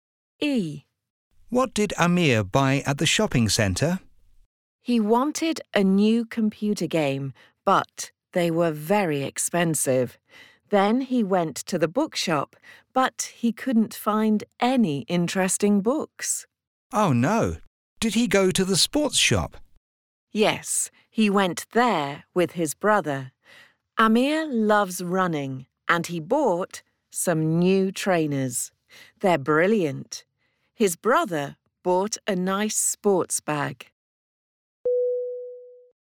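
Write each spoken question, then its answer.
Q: What did Amir buy at the shopping centre?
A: New trainers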